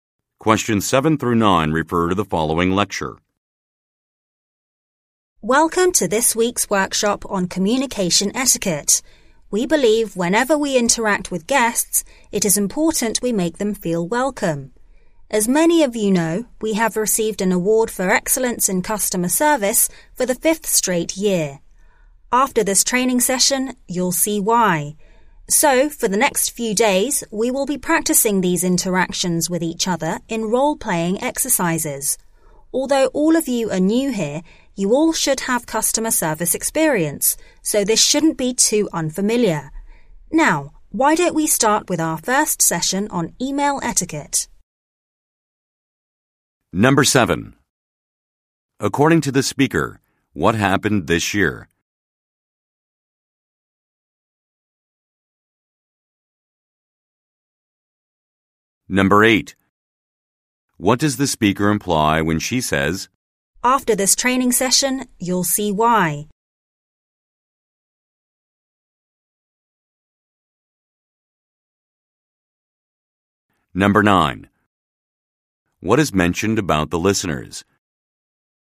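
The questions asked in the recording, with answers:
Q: According to the speaker, what happened this year?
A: They received an award for excellence in customer service for the 5th straight year

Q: What does the speaker imply when she says,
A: The training will show why they have won the customer service award

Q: What is mentioned about the listeners?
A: They are new employees with customer service experience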